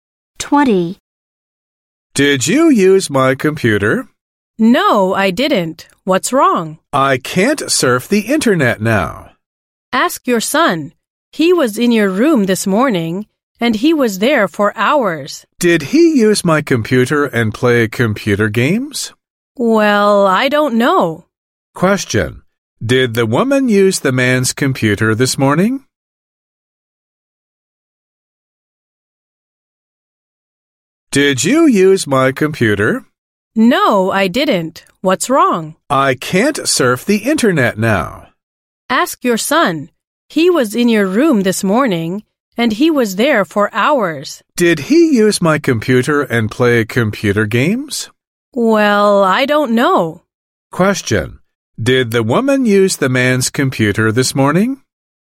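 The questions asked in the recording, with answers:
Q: Did the woman use the man's computer this morning?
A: No, she didn't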